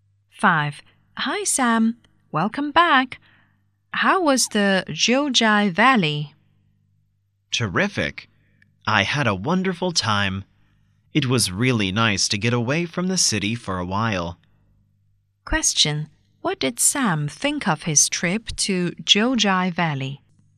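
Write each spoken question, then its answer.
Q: What did Sam think of his trip to Jiujiai Valley?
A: It was terrific; he had a wonderful time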